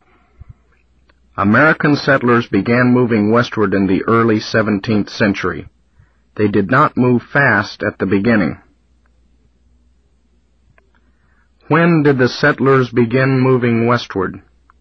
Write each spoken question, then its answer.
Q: When did the settlers begin moving westward?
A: In the early 17th century.